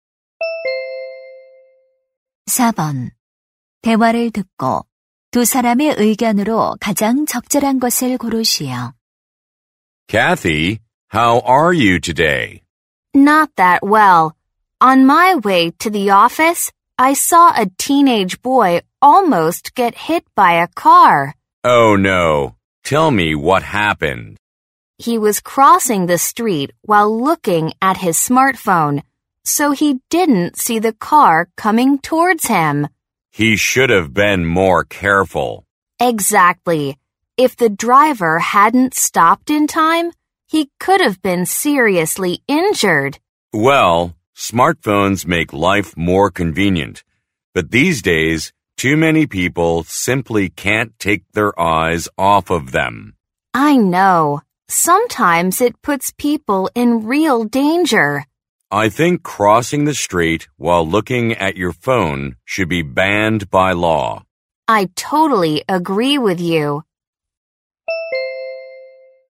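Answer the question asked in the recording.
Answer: 스마트폰을 보며 길을 건너는 것을 법으로 금지해야 한다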